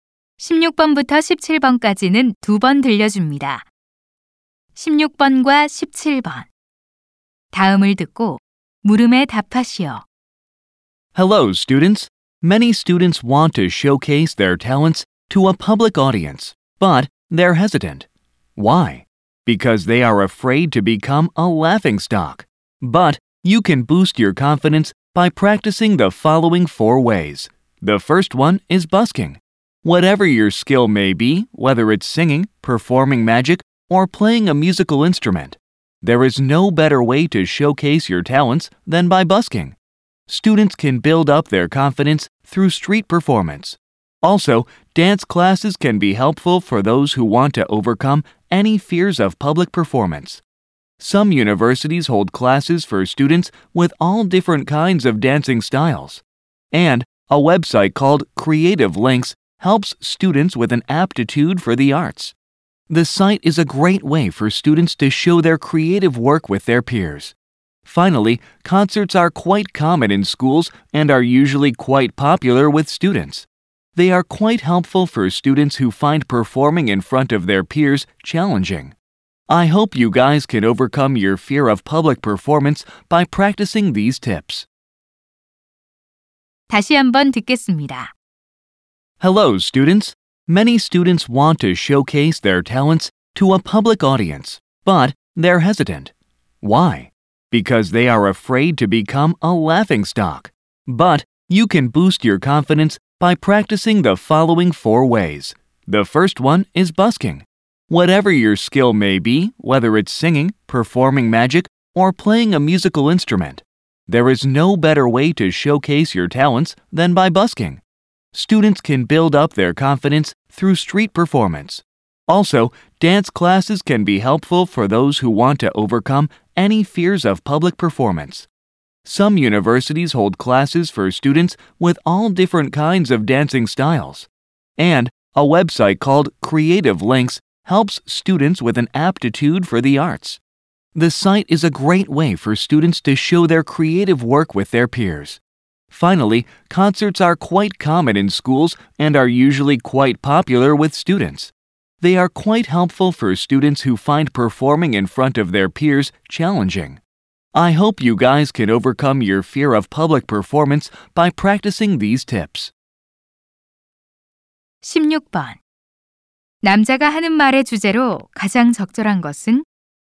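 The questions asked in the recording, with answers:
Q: 남자가 하는 말의 주제로 가장 적절한 것은?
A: 남들 앞에서 공연하는 것에 대한 두려움을 극복하는 방법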